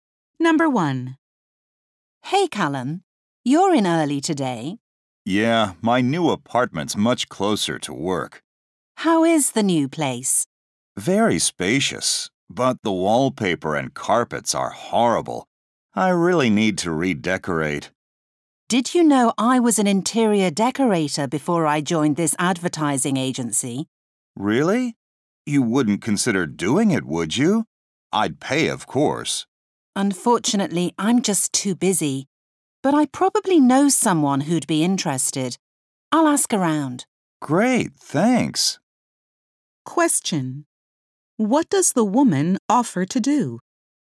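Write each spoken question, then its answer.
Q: What does the woman offer to do?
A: Ask around to find someone who would redecorate his apartment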